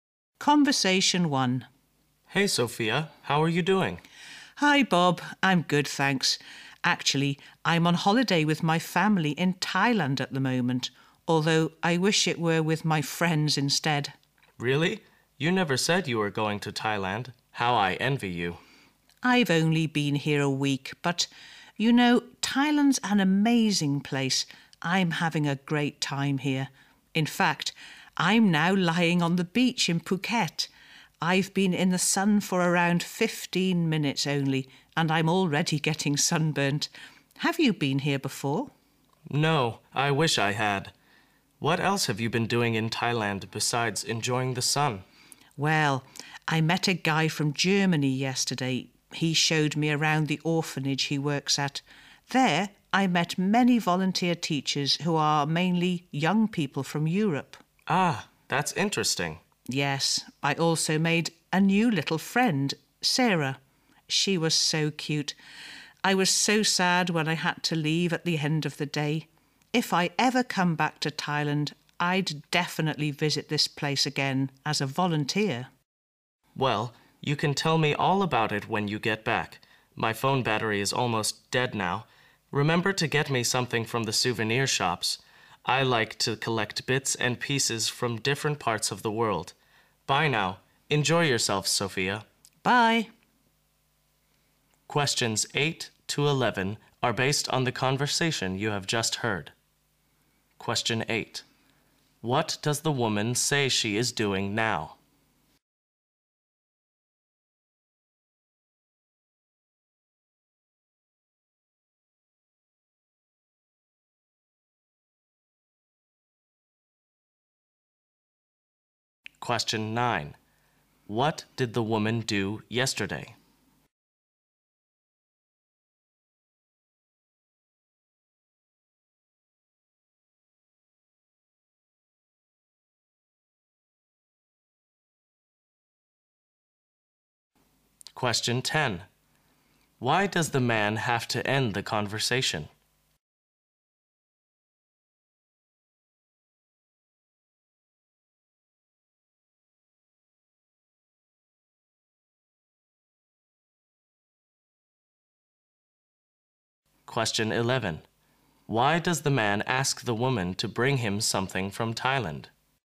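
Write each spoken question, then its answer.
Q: What does the woman say she is doing now?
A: Lying on the beach in Phuket

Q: What did the woman do yesterday?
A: Visited an orphanage

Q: Why does the man have to end the conversation?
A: His phone battery is almost dead

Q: Why does the man ask the woman to bring him something from Thailand?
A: He collects bits and pieces from different parts of the world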